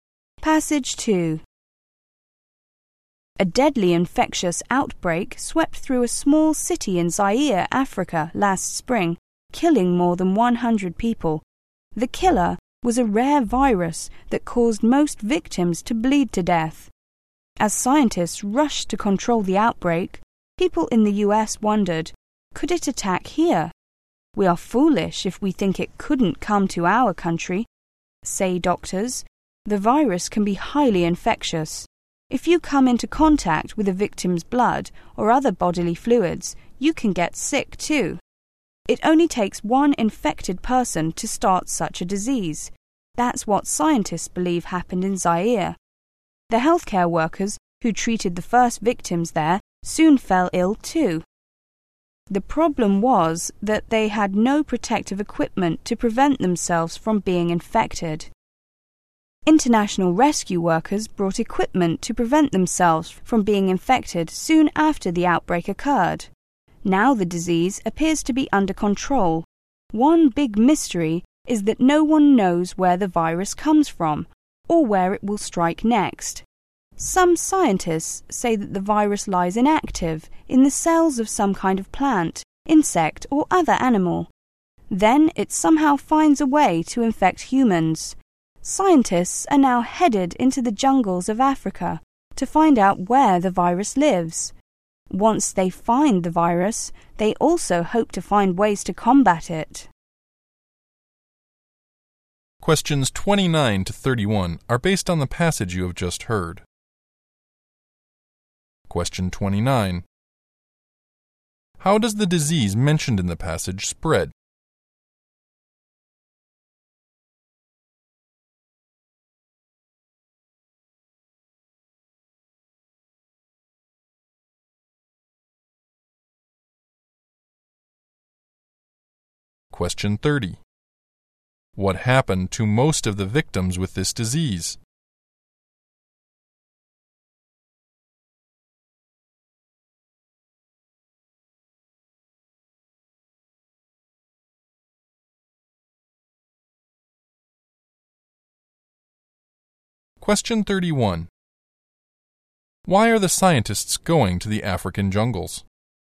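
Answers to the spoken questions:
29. Through contact with a victim's blood or other bodily fluids
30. They bled to death.
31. To find out where the virus lives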